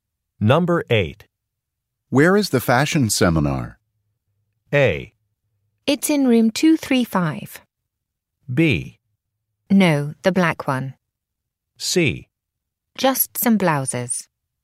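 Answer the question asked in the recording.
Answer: A: It's in room 235.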